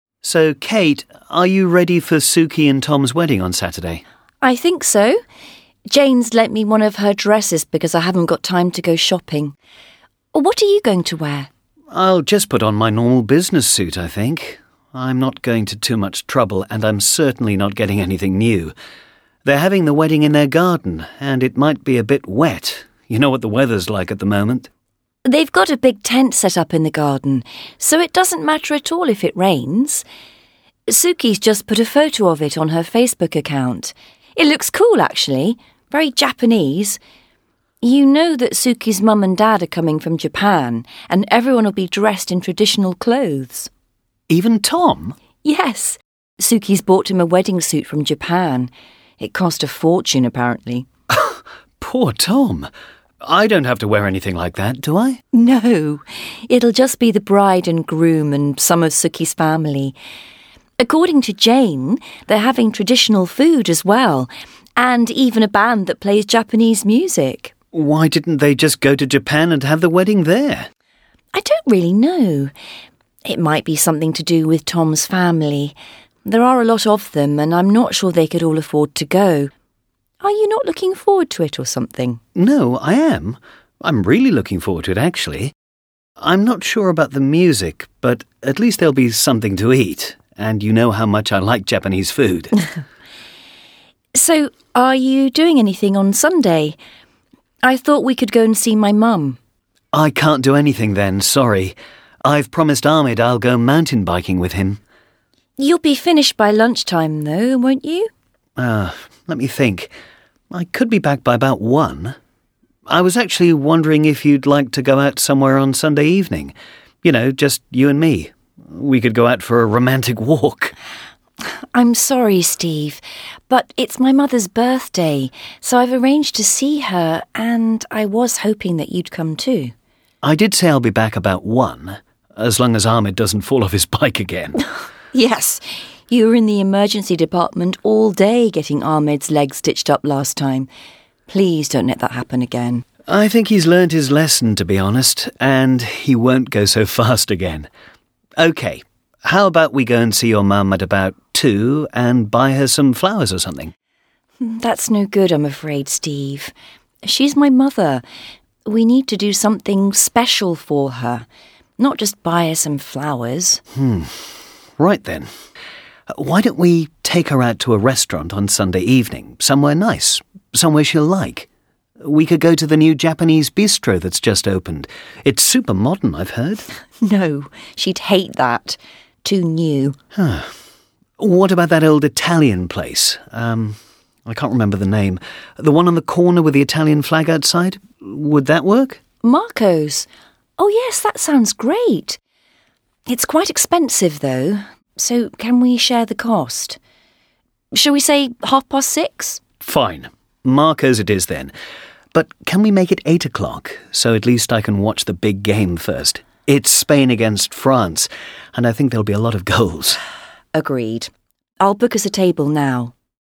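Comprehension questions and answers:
Listen to Kate and Steve talking about their plans for the weekend. Write true (T) or false (F).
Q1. Steve and Kate are going to a wedding on Saturday.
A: T

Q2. Steve thinks it may rain on Saturday.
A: T

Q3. Steve will have to put on traditional Japanese clothes.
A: F

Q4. Steve is doing something with his friend on Sunday morning.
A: T

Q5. Steve would prefer to go out with Kate alone on Sunday evening.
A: T

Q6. Kate would rather Steve visited her mother.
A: T

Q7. Steve won't be back until two on Sunday.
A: F

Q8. Steve has learned not to ride his mountain bike so fast.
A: F

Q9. They are seeing Kate's mother in the afternoon.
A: F

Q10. Kate thinks the Japanese restaurant won't be good for her mother.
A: T

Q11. They decide to book a table at half past six.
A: F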